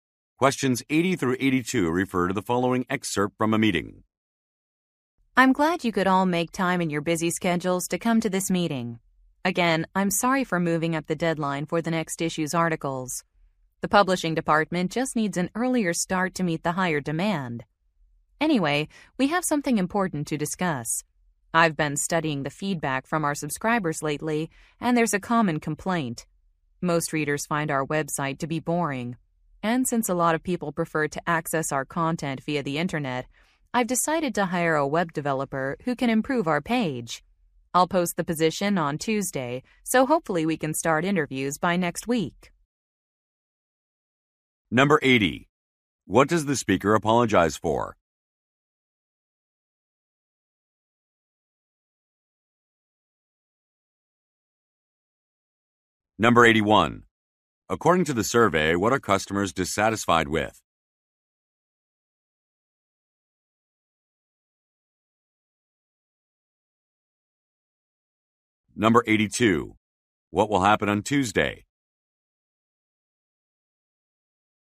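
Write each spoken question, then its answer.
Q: What does the speaker apologize for?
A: Moving up a deadline

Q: According to the survey, what are customers dissatisfied with?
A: The website (it is boring)

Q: What will happen on Tuesday?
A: A job opening for a web developer will be posted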